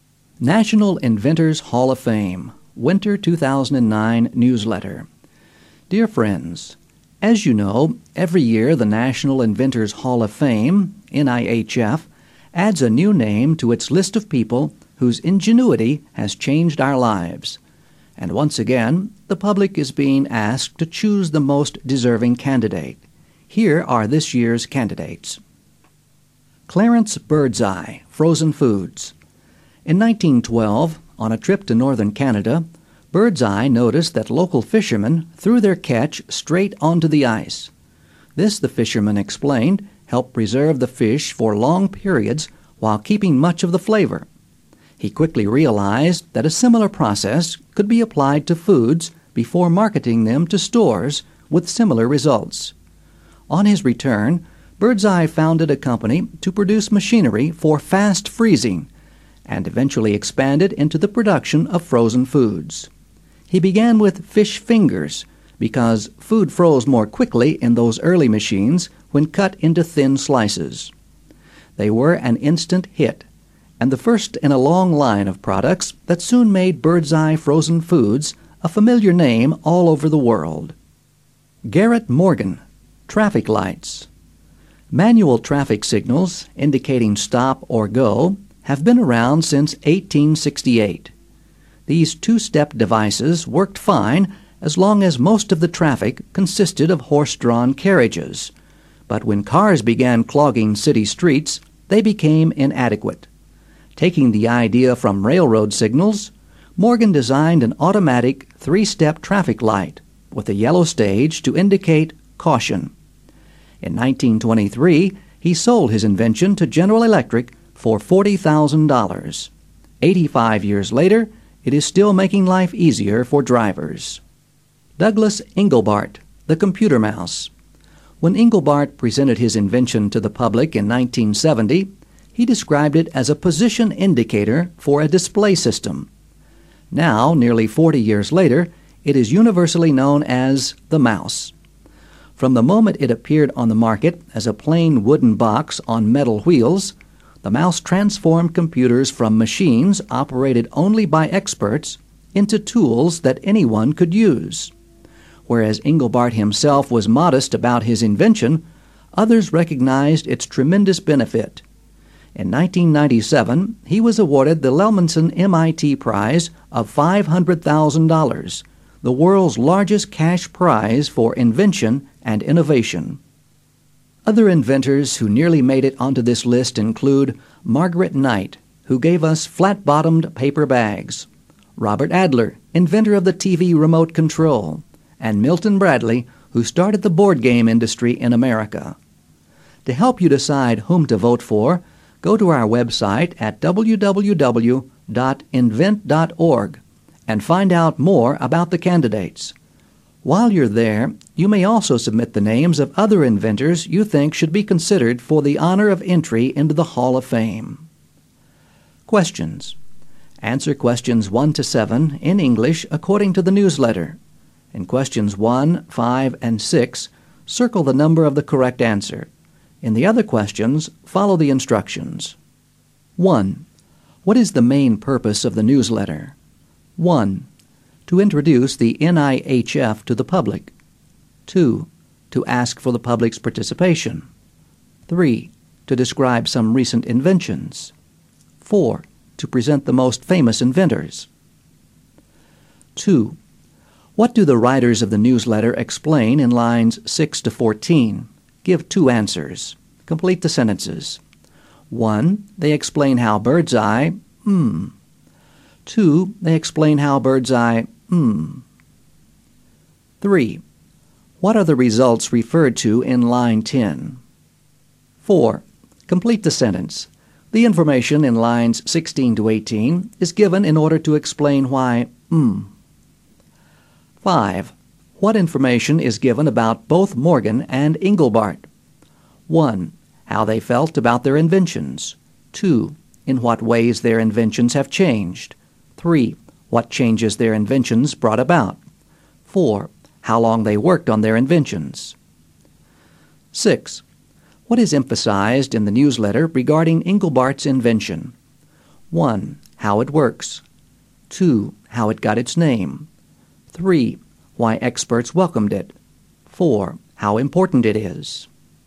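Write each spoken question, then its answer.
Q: What is the main purpose of the newsletter?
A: 2: To ask for the public's participation.

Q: What information is given about both Morgan and Engelbart?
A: 3: What changes their inventions brought about.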